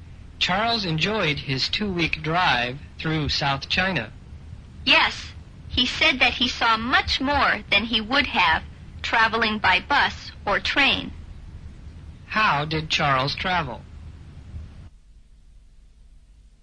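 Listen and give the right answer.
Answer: By car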